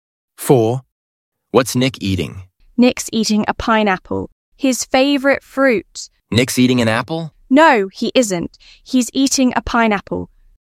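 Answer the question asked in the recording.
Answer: a pineapple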